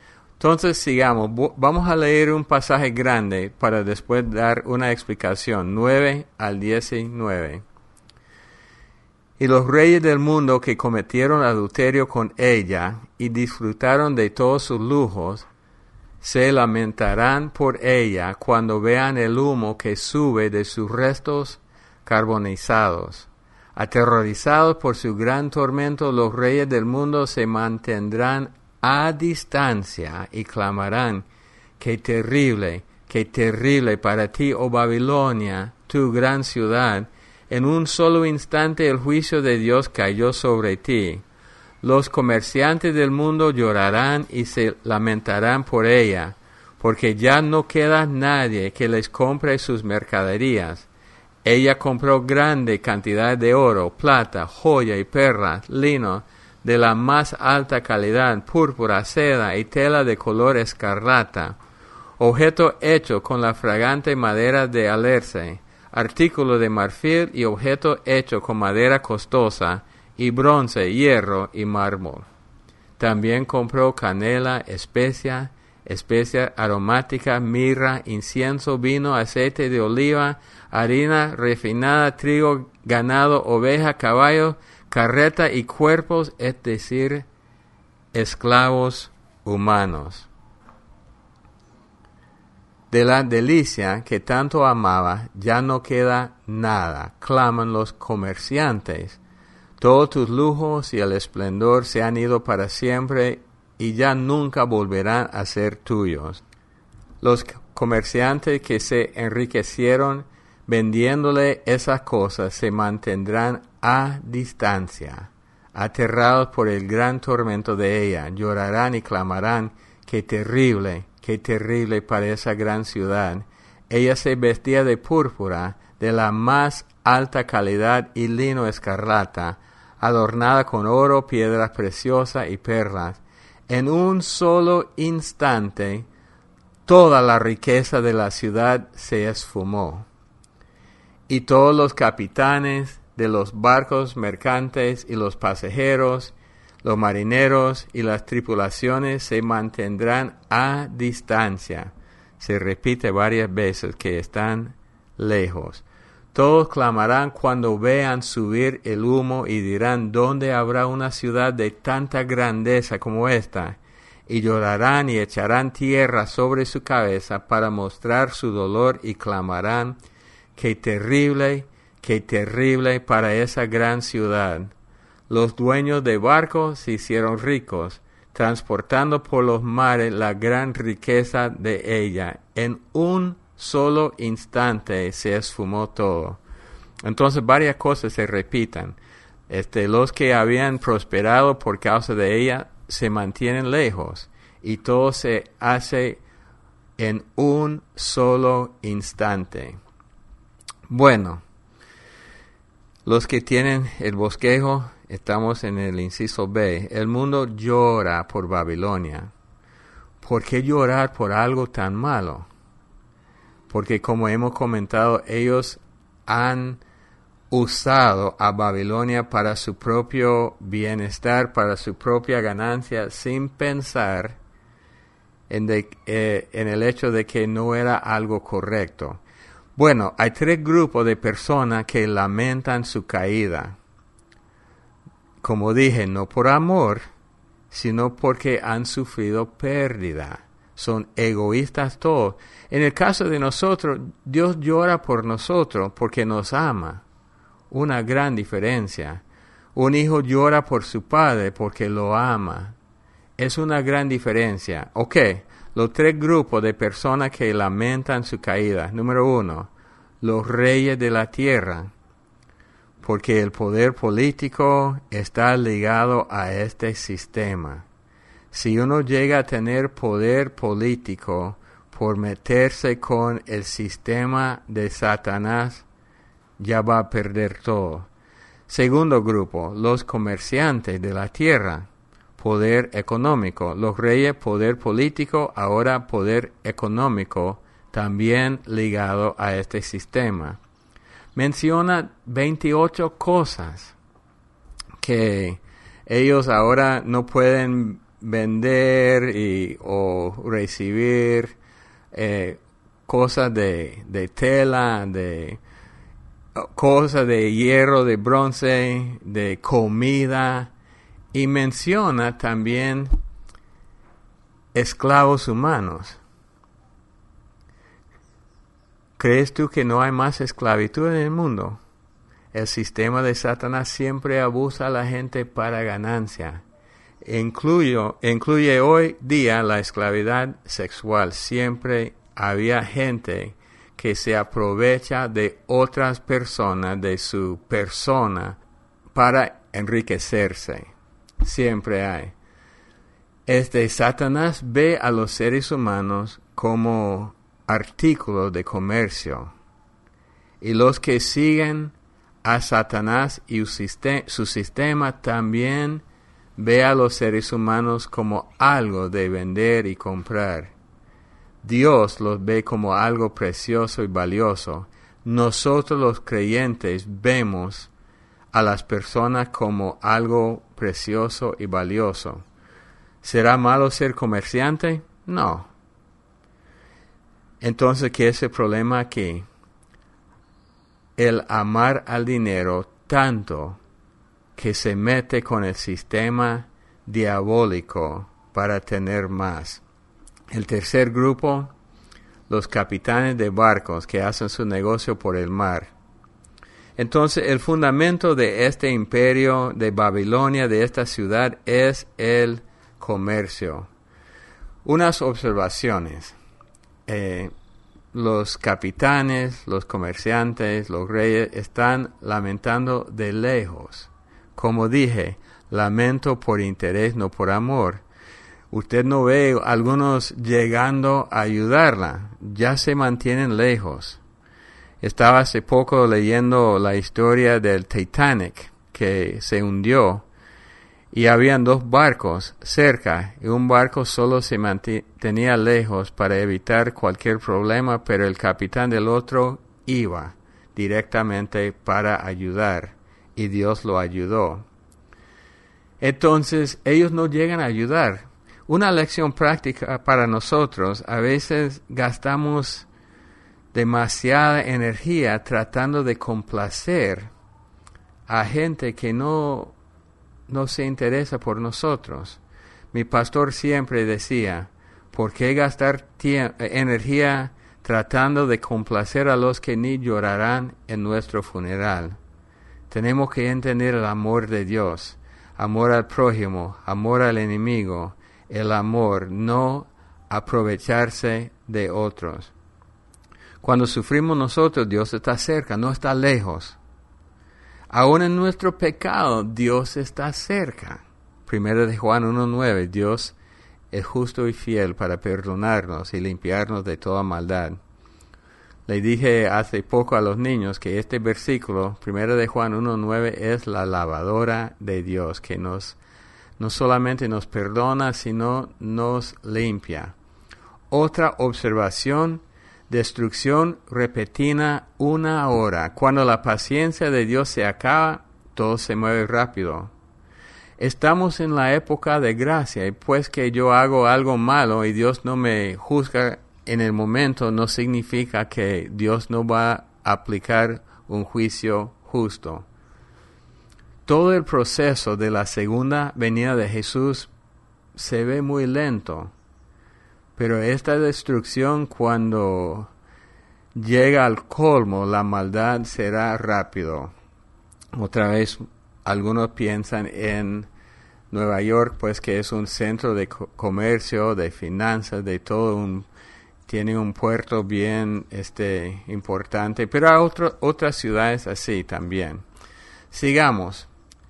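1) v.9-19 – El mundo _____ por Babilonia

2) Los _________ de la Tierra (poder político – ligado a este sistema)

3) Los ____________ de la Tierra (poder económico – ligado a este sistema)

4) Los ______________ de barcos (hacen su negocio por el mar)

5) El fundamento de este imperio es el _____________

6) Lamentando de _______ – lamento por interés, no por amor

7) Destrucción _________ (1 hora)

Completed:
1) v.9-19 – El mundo llora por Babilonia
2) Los reyes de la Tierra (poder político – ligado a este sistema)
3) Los comerciantes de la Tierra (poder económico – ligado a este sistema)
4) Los capitanes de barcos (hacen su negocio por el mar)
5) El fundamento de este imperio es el comercio
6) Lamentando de lejos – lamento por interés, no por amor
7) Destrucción repentina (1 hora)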